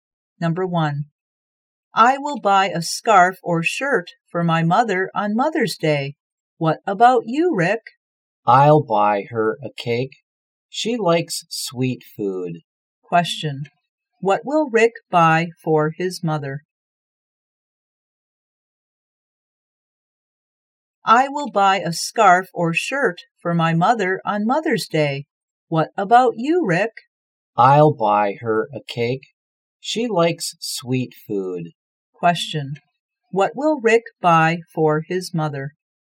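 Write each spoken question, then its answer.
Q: What will Rick buy for his mother?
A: A cake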